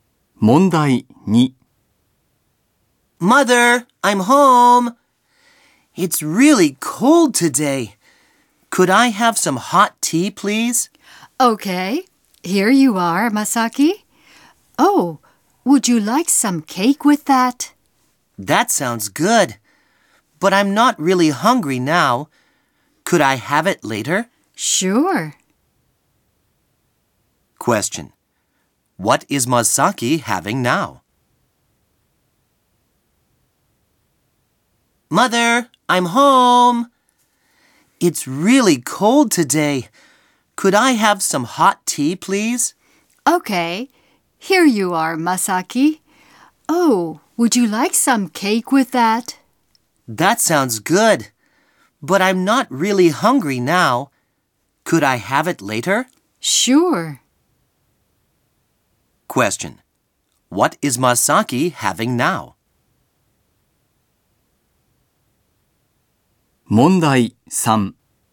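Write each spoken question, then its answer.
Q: Question. What is Masaki having now?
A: Hot tea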